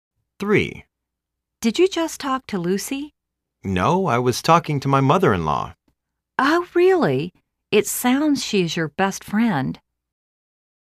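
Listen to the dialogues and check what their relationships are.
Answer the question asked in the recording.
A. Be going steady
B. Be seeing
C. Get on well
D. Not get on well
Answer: C. Get on well

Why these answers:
A:Did you just talk to Lucy? B:No.I was talking to my mother-in-law. A:Oh,reallyl It sounds she is your best friend.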